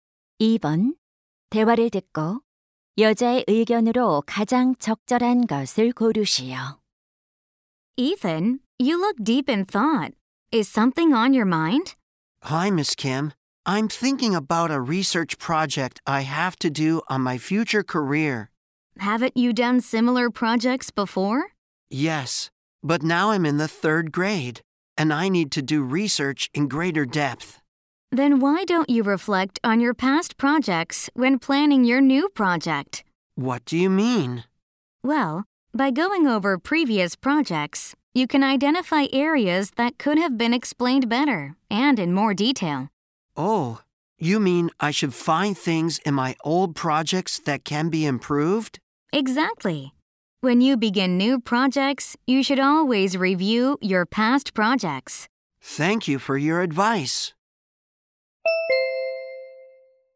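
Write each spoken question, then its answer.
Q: 대화를 듣고 여자의 의견으로 가장 적절한 것을 고르시오.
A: 새 프로젝트를 시작할 때 과거 프로젝트를 검토해야 한다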